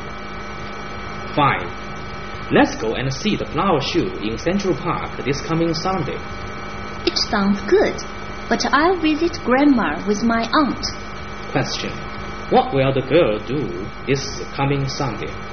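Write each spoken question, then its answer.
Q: what will the girl do this coming Sunday?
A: Visit Grandma with her aunt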